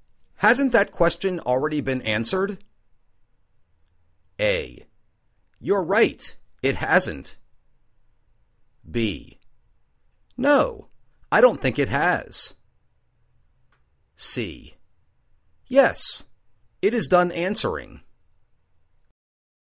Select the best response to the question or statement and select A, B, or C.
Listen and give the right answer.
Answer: No, I don't think it has.